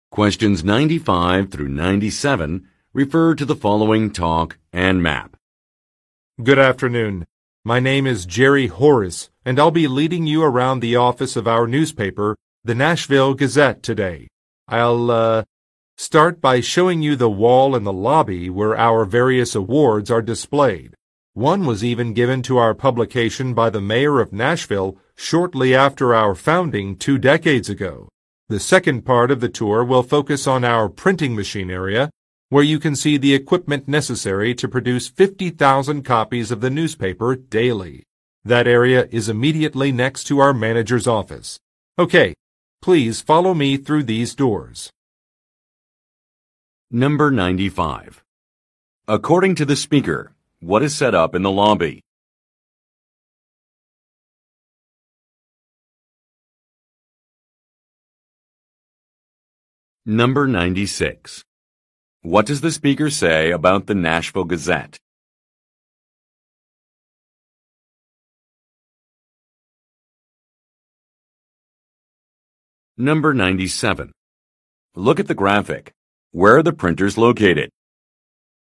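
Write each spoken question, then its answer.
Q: According to the speaker, what is set up in the lobby?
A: A display of the newspaper's awards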